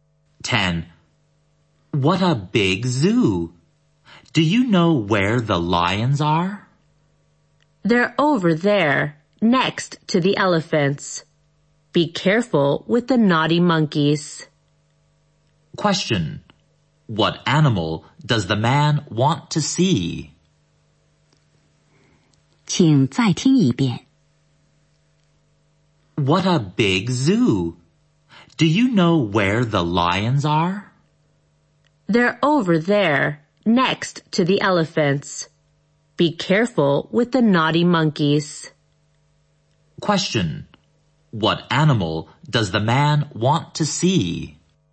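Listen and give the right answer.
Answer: Lions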